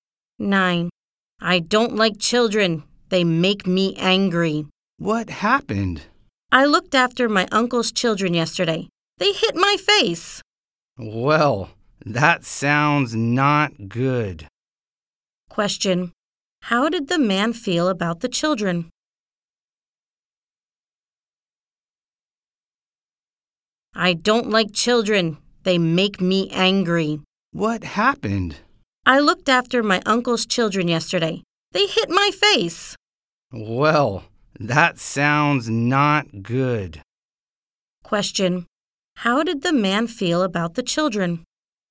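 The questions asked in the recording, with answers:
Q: How did the man feel about the children?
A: Angry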